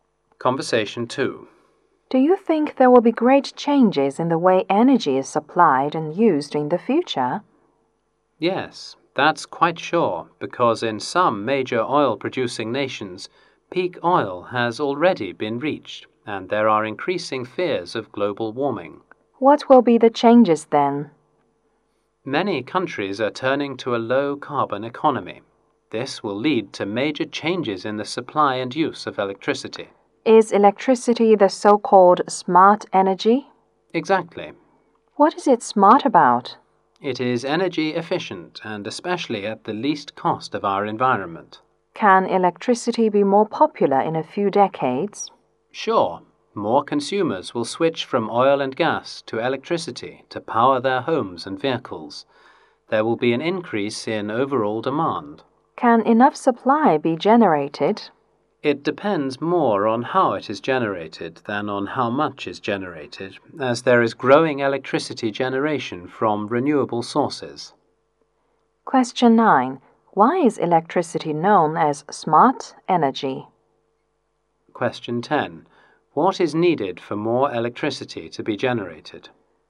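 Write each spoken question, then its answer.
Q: Why is electricity known as smart energy?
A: It is energy efficient at the least cost to the environment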